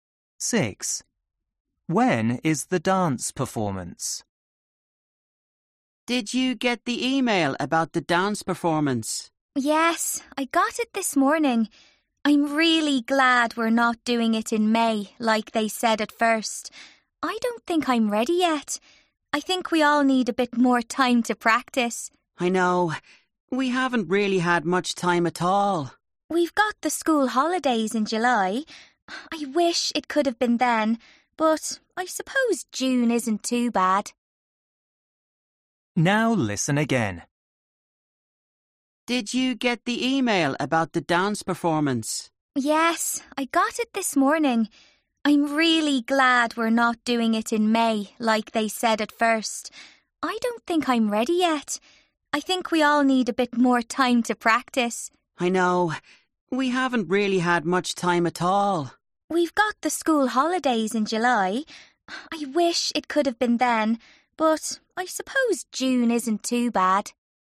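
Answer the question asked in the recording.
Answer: in June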